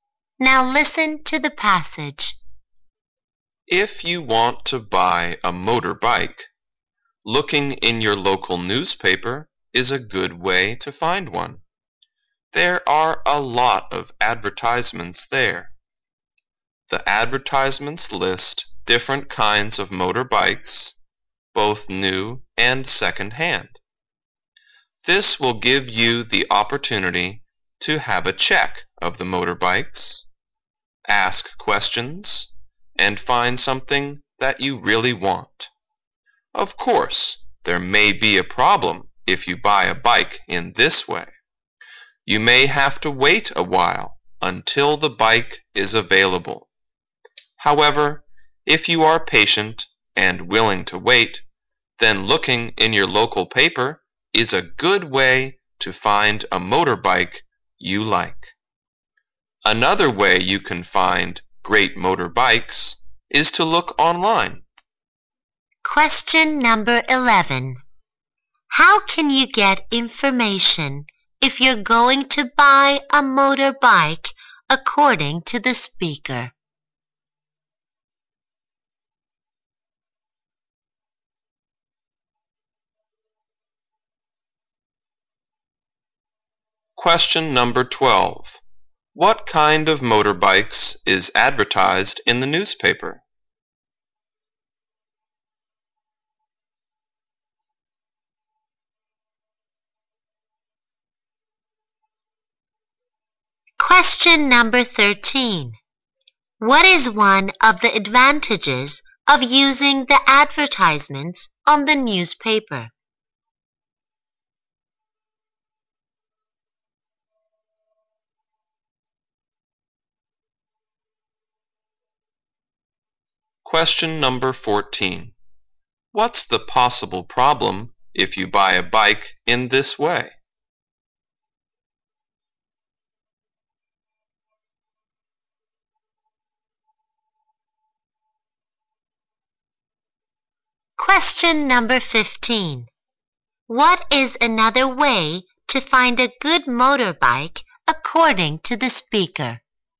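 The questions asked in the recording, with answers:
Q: How can you get information if you're going to buy a motorbike according to the speaker?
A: Looking in the local newspaper

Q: What kind of motorbikes is advertised in the newspaper?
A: Both new and second-hand

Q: What is one of the advantages of using the advertisements on the newspaper?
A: You can check the motorbikes and ask questions

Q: What's the possible problem if you buy a bike in this way?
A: You may have to wait a while

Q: What is another way to find a good motorbike according to the speaker?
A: Look online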